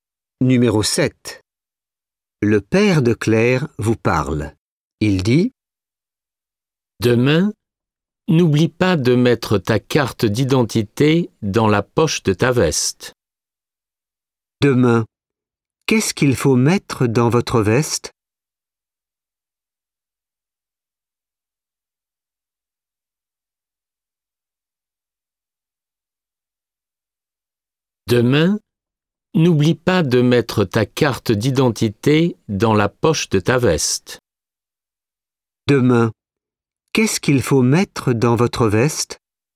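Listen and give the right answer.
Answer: Votre carte d'identité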